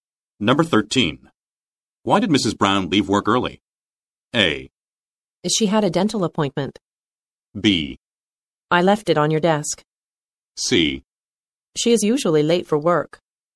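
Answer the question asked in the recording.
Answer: A: She had a dental appointment.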